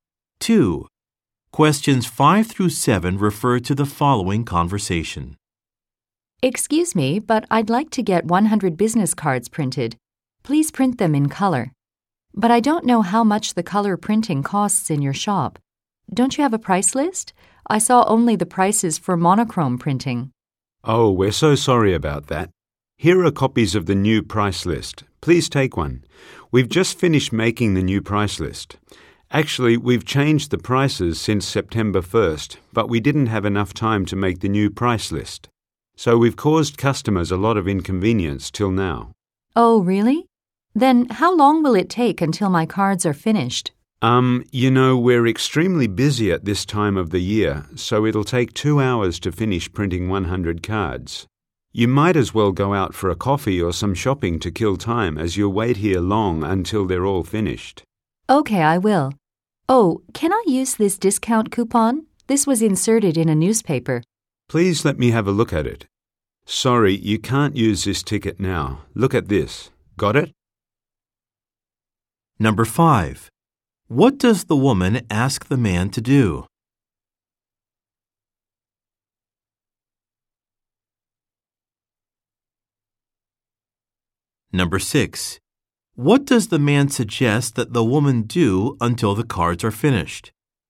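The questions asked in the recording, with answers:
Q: What does the man suggest that the woman do until the cards are finished?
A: Go out for a coffee or some shopping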